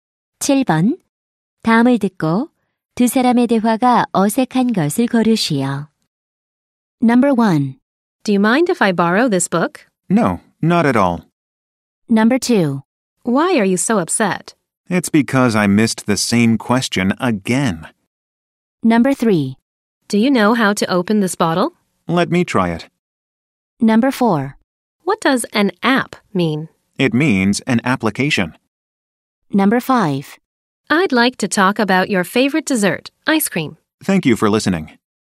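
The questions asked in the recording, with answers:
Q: 다음을 듣고 두 사람의 대화가 어색한 것을 고르시오.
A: 5번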